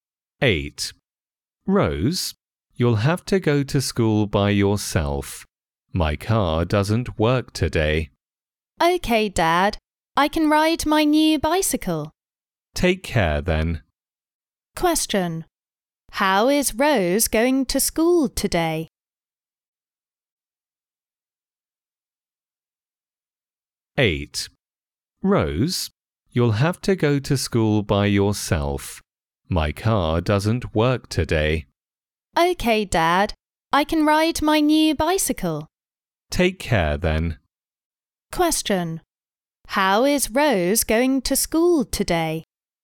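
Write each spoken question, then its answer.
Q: How is Rose going to school today?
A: By bike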